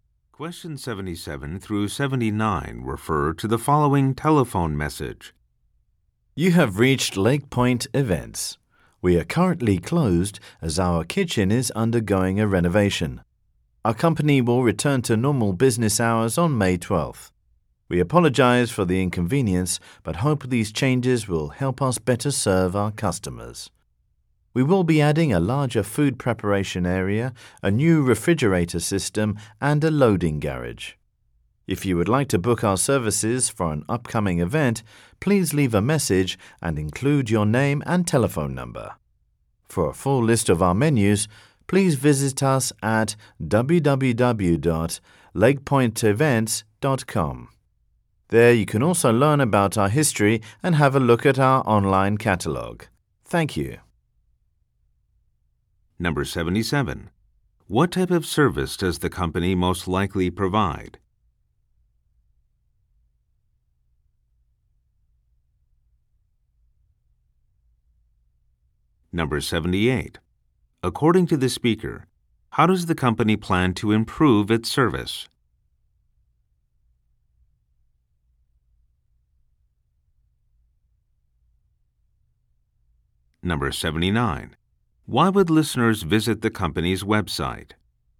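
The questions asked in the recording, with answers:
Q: What type of service does the company most likely provide?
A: Catering for events

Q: According to the speaker, how does the company plan to improve its service?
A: By renovating its kitchen

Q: Why would listeners visit the company's website?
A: To see the full list of menus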